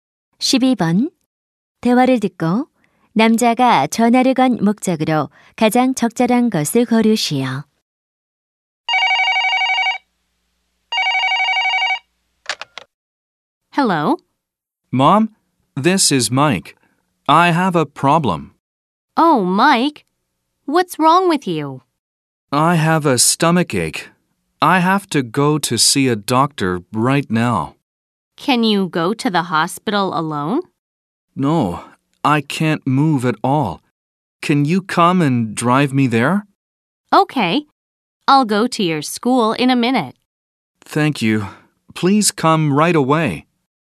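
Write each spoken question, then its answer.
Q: 대화를 듣고 남자가 전화를 건 목적으로 가장 적절한 것을 고르시오.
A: 병원에 차로 데려다 달라고 부탁하려고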